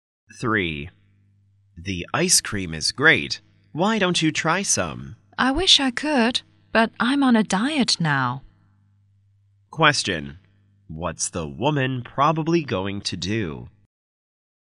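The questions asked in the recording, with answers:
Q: What's the woman probably going to do?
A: Not eat the ice cream because she's on a diet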